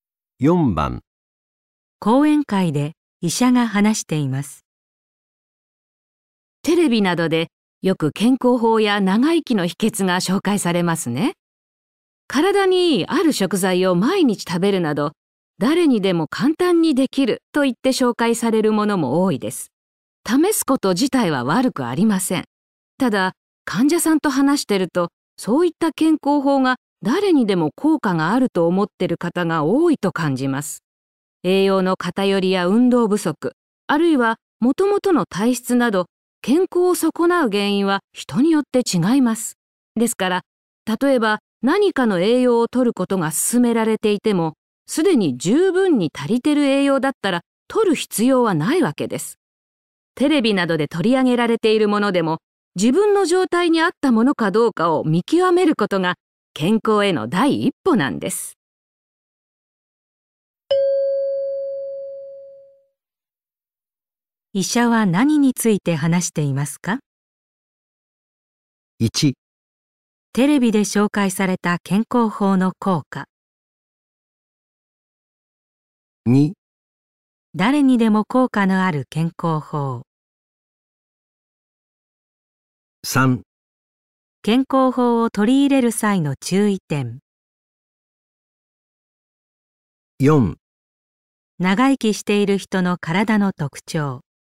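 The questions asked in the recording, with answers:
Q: 医者は何について話していますか?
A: 3: 健康法を取り入れる際の注意点。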